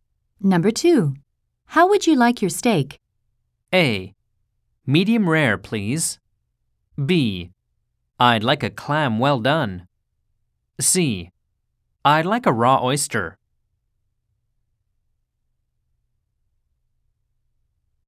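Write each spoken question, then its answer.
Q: How would you like your steak?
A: A: Medium rare, please.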